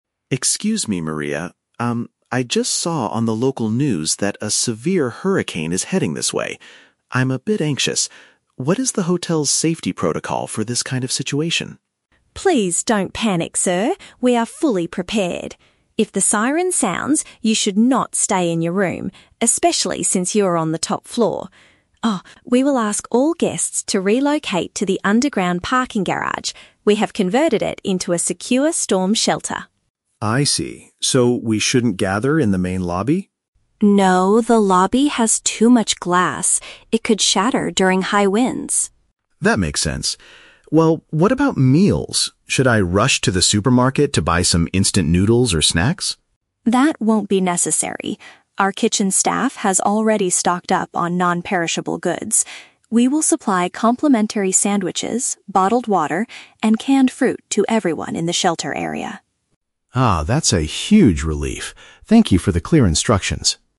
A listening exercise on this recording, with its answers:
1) Where must the hotel guests take shelter when the alarm goes off?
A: In a designated area below ground.

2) What is the main danger of hiding in the lobby area?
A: The large windows could easily break and cause injuries.

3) How will the guests get food during the emergency?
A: They will be provided with free ready-to-eat meals and drinks.

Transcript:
Guest: Excuse me, Maria. Um, I just saw on the local news that a severe hurricane is heading this way. I'm a bit anxious. What is the hotel's safety protocol for this kind of situation?
Receptionist: Please don't panic, sir. We are fully prepared. If the siren sounds, you should not stay in your room, especially since you are on the top floor. Ah, we will ask all guests to relocate to the underground parking garage. We have converted it into a secure storm shelter.
Guest: I see. So we shouldn't gather in the main lobby?
Receptionist: No, the lobby has too much glass. It could shatter during high winds.
Guest: That makes sense. Well, what about meals? Should I rush to the supermarket to buy some instant noodles or snacks?
Receptionist: That won't be necessary. Our kitchen staff has already stocked up on non-perishable goods. We will supply complimentary sandwiches, bottled water, and canned fruit to everyone in the shelter area.